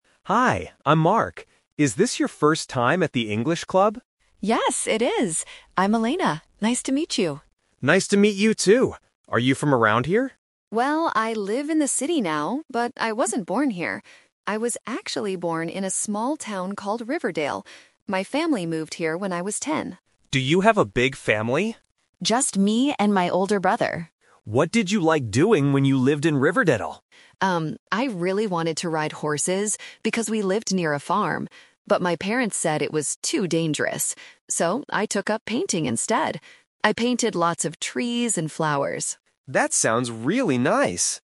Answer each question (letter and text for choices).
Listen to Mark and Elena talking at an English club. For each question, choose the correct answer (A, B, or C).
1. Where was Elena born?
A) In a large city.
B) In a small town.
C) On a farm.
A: B) In a small town.

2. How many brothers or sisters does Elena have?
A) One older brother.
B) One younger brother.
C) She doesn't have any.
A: A) One older brother.

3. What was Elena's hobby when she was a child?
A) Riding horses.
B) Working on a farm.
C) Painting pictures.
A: C) Painting pictures.

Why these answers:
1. Elena says, "I was actually born in a small town called Riverdale." Why the traps are wrong: Option A is incorrect because she lives in the city now, but she wasn't born there. Option C is incorrect because she lived near a farm, not on it.
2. When Mark asks if she has a big family, Elena clearly answers, "Just me and my older brother." Why the traps are wrong: Options B and C do not match the audio.
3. Elena says, "So, I took up painting instead. I painted lots of trees and flowers." Why the traps are wrong: Option A is the "Twist Trap". She wanted to ride horses, but her parents said it was too dangerous. Option B is incorrect because she only lived near a farm; she didn't work on one.

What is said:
Mark: Hi, I'm Mark. Is this your first time at the English club?
Elena: Yes, it is. I'm Elena. Nice to meet you.
Mark: Nice to meet you too. Are you from around here?
Elena: Well, I live in the city now, but I wasn't born here. I was actually born in a small town called Riverdale. My family moved here when I was ten.
Mark: Do you have a big family?
Elena: Just me and my older brother.
Mark: What did you like doing when you lived in Riverdale?
Elena: Um, I really wanted to ride horses, because we lived near a farm. But my parents said it was too dangerous. So, I took up painting instead. I painted lots of trees and flowers.